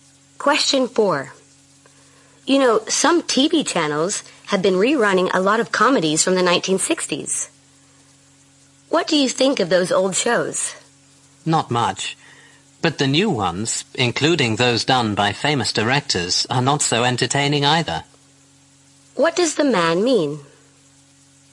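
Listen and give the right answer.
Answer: He doesn't think much of either the old or the new shows.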